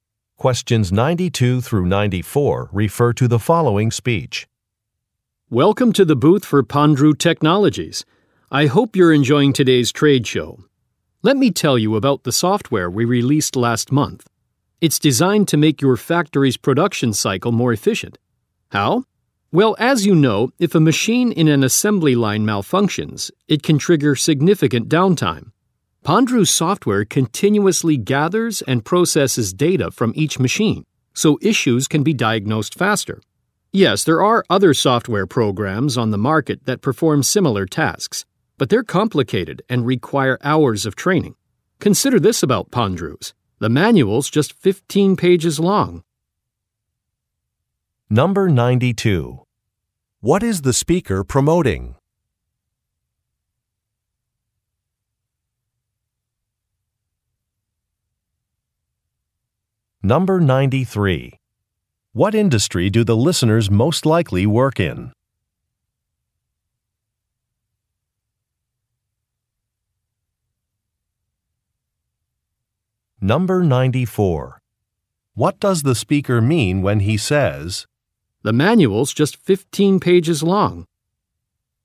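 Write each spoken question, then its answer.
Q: What is the speaker promoting?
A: Software for factory production

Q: What industry do the listeners most likely work in?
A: Manufacturing

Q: What does the speaker mean when he says,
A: The software is easy to learn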